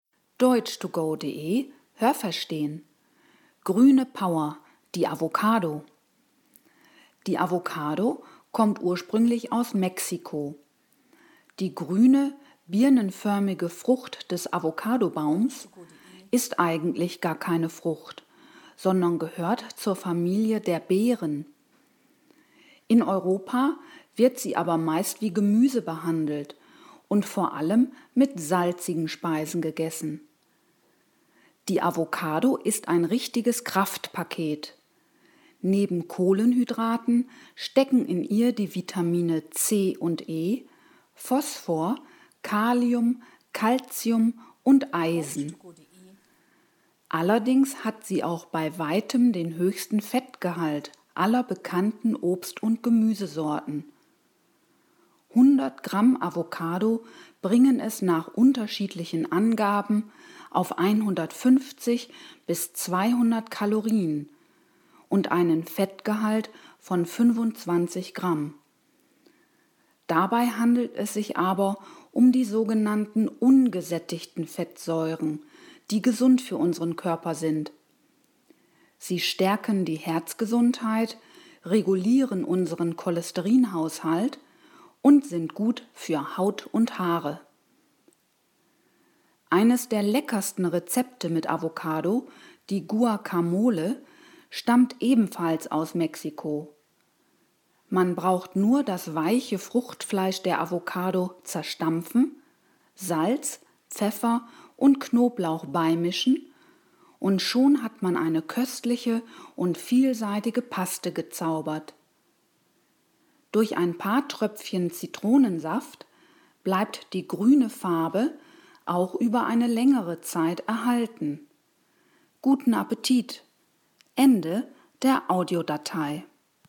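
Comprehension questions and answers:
Haben Sie das gehört? Stimmt diese Aussage?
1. Die Avocado ist eine Beerenart.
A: Ja, das habe ich gehört.

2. In Mexiko wird sie meist zu salzigen Speisen gegessen.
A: Nein, das habe ich nicht gehört.

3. Die Avocado ist relativ nährstoffarm.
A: Nein, das habe ich nicht gehört.

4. Avocados verfügen laut Text über Vitamin C und B.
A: Nein, das habe ich nicht gehört.

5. Avocados sind recht fetthaltig.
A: Ja, das habe ich gehört.

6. Eine Avocado hat zwischen 150 und 200 Kalorien.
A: Nein, das habe ich nicht gehört.

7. Das Fett in der Avocado gefährdet unsere Gesundheit.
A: Nein, das habe ich nicht gehört.

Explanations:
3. In ihr stecken Vitamine und Mineralien wie z.B. Kalium und Kalzium.
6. Diese Werte gelten für 100 Gramm Avocado.

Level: B2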